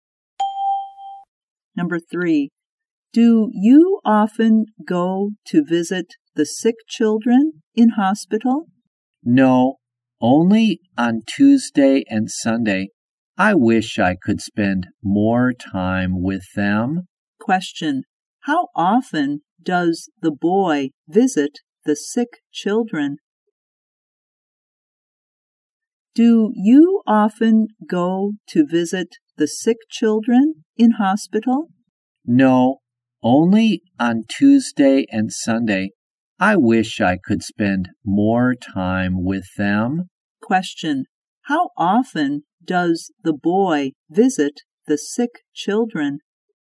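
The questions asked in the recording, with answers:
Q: Question, how often does the boy visit the sick children?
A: Twice a week (on Tuesday and Sunday)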